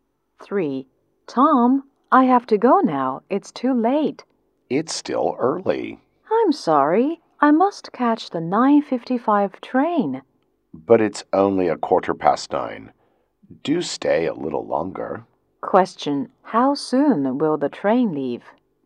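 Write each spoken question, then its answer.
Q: how soon will the train leave?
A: In 40 minutes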